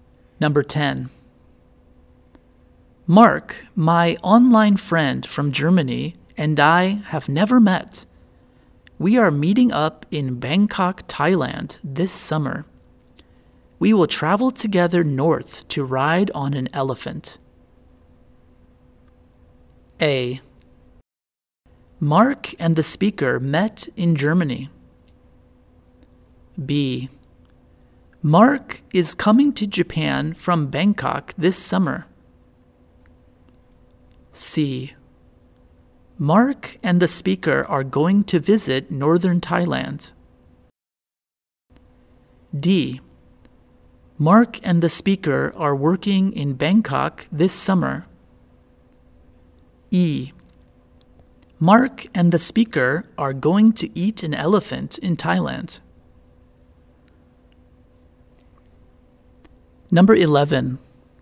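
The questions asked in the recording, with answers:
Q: Mark, my online friend from Germany, and I have never met.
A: C: Mark and the speaker are going to visit northern Thailand.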